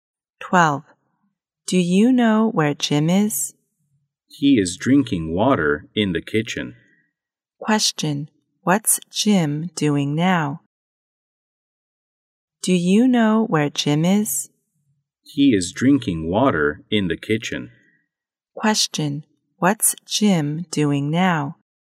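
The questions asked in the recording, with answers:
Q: What's Jim doing now?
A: Drinking water in the kitchen.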